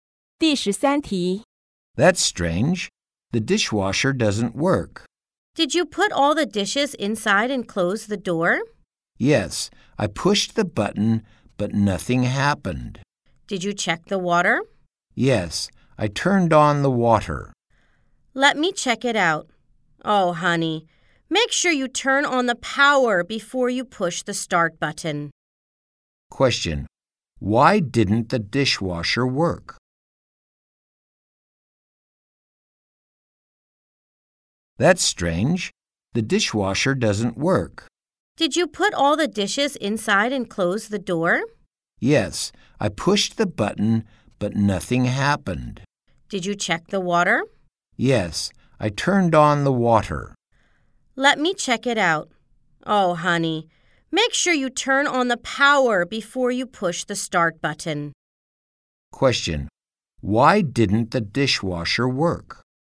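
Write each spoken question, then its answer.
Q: Why didn't the dishwasher work?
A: The power wasn't turned on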